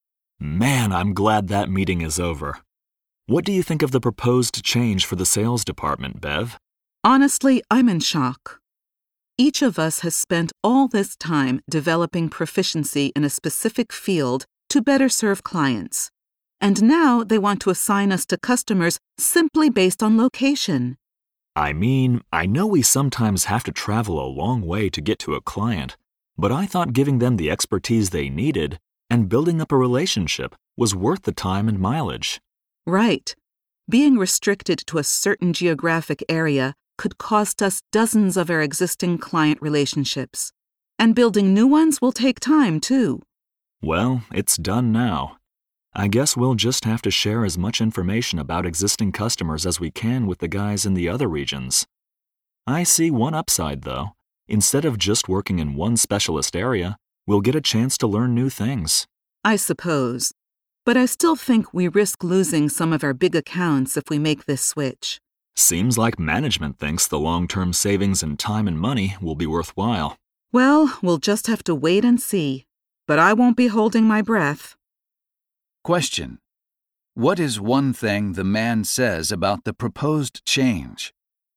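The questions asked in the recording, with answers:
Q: What is one thing the man says about the proposed change?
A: It will give them a chance to learn new things outside one specialist area.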